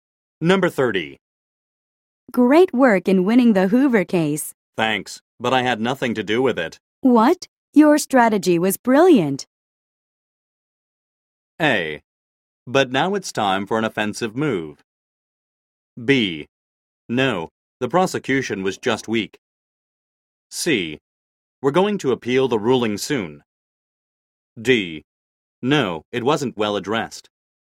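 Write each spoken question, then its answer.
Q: What? Your strategy was brilliant.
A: B: No, the prosecution was just weak.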